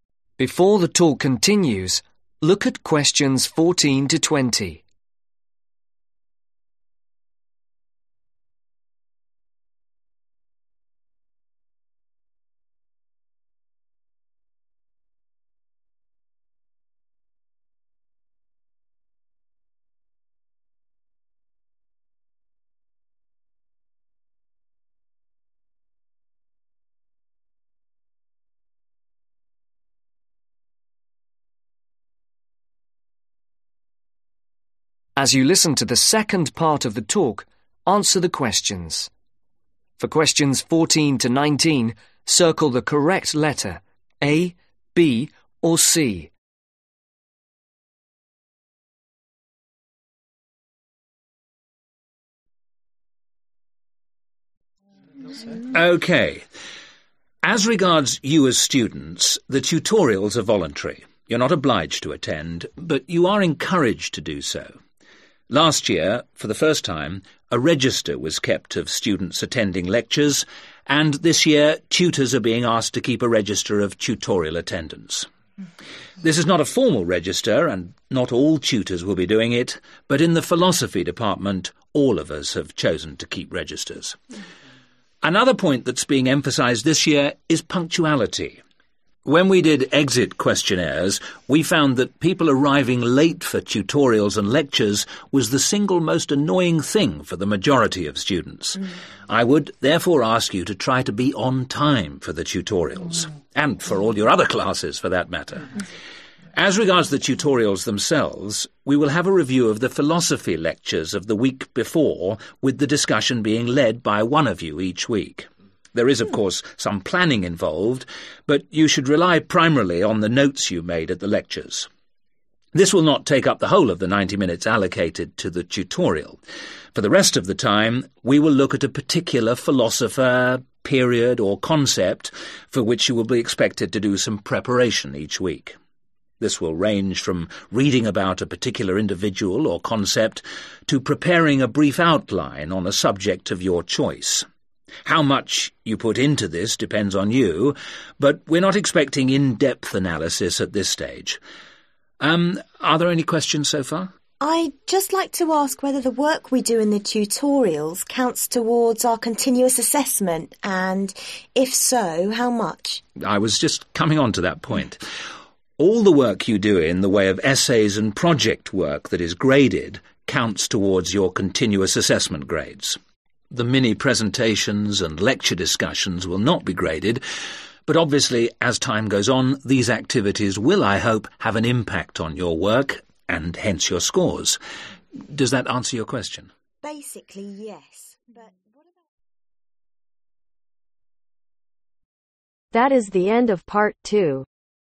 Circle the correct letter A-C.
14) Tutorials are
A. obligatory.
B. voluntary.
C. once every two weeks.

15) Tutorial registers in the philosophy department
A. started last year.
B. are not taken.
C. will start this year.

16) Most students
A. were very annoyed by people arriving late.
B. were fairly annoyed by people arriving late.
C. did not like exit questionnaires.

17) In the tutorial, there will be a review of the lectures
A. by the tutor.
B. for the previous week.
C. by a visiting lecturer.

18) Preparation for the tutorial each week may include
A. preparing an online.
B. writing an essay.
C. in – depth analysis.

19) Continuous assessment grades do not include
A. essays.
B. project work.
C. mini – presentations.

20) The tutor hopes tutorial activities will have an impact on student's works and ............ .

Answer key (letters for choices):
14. B
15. C
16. A
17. B
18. A
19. C
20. Scores